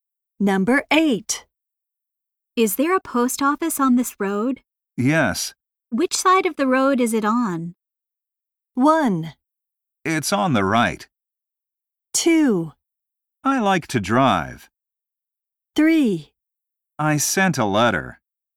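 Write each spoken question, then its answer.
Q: Which side of the road is it on?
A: 1: It's on the right.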